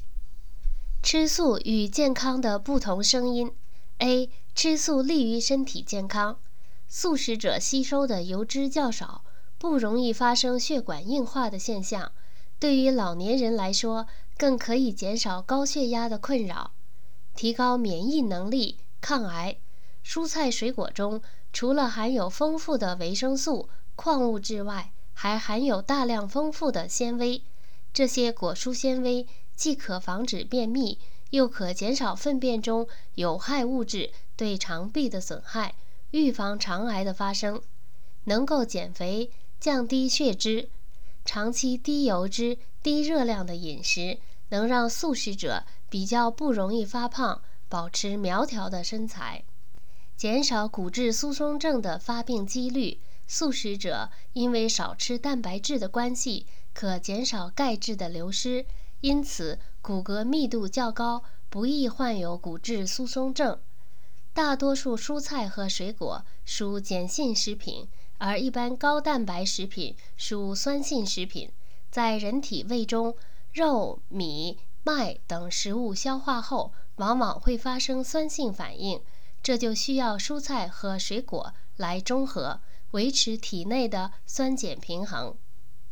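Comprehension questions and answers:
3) 为什么素食者不容易发生血管硬化?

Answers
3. 因为素食者吸收的油脂较少

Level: 3rd Year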